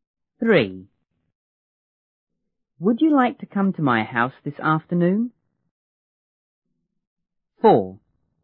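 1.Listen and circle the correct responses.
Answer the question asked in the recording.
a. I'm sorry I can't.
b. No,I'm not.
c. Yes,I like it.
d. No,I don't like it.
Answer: a. I'm sorry I can't.

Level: 初中英语广州版1B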